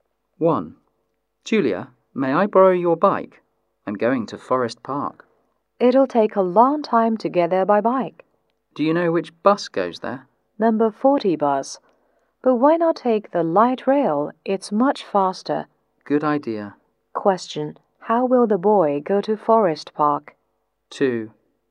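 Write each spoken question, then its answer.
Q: How will the boy go to Forest Park?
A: By light rail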